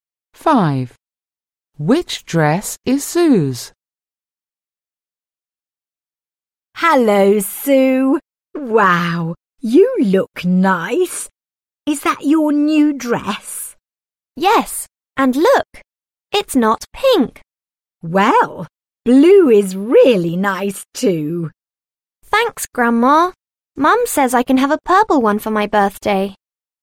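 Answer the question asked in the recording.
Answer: the blue dress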